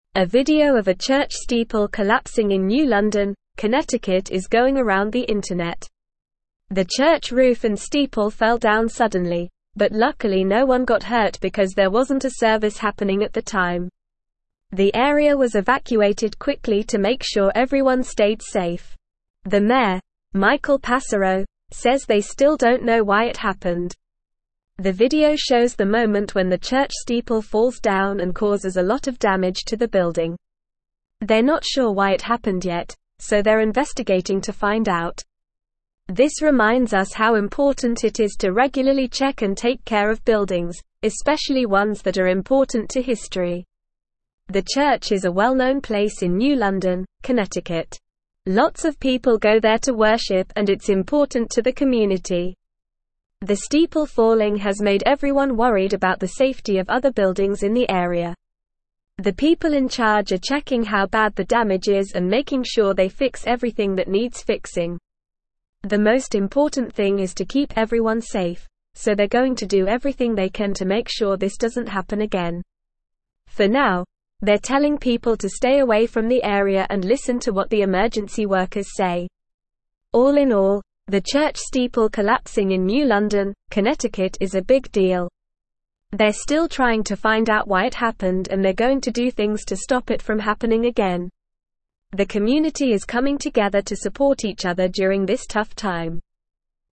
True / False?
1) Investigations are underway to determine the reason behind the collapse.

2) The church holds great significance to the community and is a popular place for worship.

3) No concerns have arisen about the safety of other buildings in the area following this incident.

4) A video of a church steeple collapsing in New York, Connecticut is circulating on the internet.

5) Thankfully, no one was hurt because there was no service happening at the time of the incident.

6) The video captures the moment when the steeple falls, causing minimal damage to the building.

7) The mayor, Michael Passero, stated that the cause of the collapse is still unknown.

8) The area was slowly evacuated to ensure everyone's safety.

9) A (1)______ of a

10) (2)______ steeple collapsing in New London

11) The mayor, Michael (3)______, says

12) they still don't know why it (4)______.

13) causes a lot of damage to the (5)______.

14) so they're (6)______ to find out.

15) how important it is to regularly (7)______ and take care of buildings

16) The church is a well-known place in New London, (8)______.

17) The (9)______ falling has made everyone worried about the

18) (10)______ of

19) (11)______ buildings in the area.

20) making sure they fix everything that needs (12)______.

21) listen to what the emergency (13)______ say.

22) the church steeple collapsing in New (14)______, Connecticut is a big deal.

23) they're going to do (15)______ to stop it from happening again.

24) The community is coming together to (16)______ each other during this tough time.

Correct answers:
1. True
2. True
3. False
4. False
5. True
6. False
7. True
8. False
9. video
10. church
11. Passero
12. happened
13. building
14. investigating
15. check
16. Connecticut
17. steeple
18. safety
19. other
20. fixing
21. workers
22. London
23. things
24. support

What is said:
A video of a church steeple collapsing in New London, Connecticut is going around the internet. The church roof and steeple fell down suddenly, but luckily no one got hurt because there wasn't a service happening at the time. The area was evacuated quickly to make sure everyone stayed safe. The mayor, Michael Passero, says they still don't know why it happened.
The video shows the moment when the church steeple falls down and causes a lot of damage to the building. They're not sure why it happened yet, so they're investigating to find out. This reminds us how important it is to regularly check and take care of buildings, especially ones that are important to history.
The church is a well-known place in New London, Connecticut. Lots of people go there to worship and it's important to the community. The steeple falling has made everyone worried about the safety of other buildings in the area.
The people in charge are checking how bad the damage is and making sure they fix everything that needs fixing. The most important thing is to keep everyone safe, so they're going to do everything they can to make sure this doesn't happen again. For now, they're telling people to stay away from the area and listen to what the emergency workers say.
They're still trying to find out why it happened and they're going to do things to stop it from happening again. The community is coming together to support each other during this tough time.

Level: Level 3